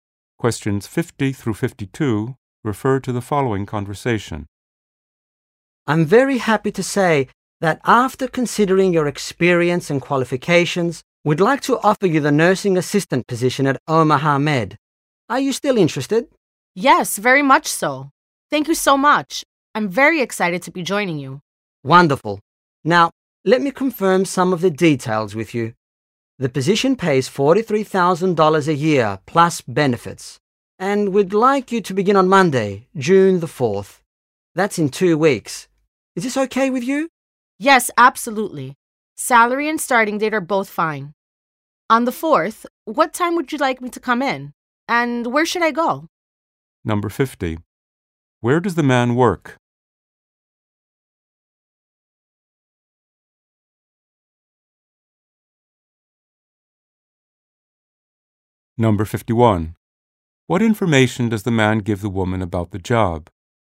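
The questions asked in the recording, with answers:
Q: Where does the man work?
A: At Omaha Med

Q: What information does the man give the woman about the job?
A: The salary ($43,000 a year) and the start date (June 4)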